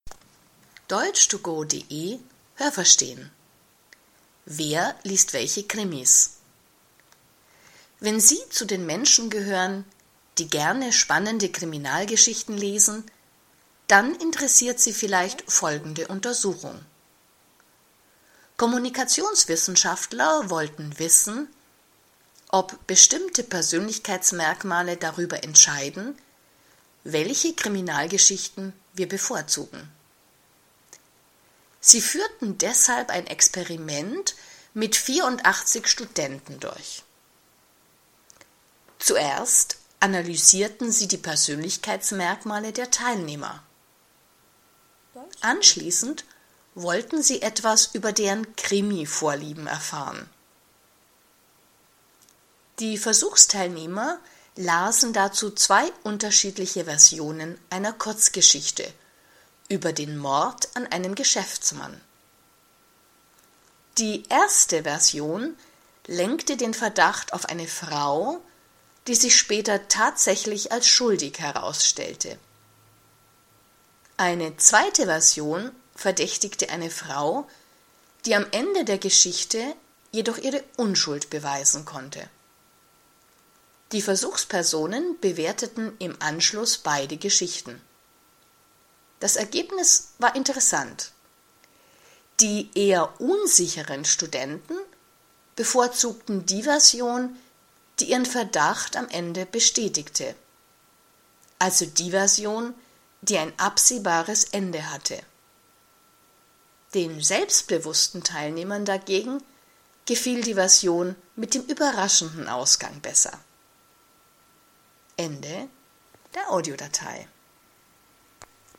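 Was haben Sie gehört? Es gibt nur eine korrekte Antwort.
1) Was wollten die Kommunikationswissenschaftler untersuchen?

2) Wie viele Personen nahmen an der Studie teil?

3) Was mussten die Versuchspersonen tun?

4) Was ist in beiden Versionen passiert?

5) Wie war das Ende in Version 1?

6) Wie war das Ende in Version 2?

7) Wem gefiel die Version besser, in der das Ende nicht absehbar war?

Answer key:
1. Ob bestimmte Persönlichkeitsmerkmale darüber entscheiden, welche Kriminalgeschichten wir bevorzugen.
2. 84 Studenten
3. Zwei Versionen einer Kurzgeschichte lesen und bewerten.
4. Ein Geschäftsmann wurde ermordet und eine Frau verdächtigt.
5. Die verdächtigte Frau war tatsächlich schuldig.
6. Die verdächtigte Frau konnte ihre Unschuld beweisen.
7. Den selbstbewussten Teilnehmern.

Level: B (mittel)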